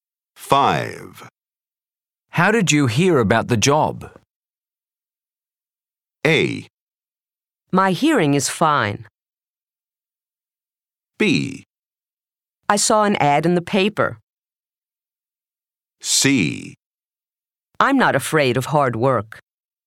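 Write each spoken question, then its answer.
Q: How did you hear about the job?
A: B: I saw an ad in the paper.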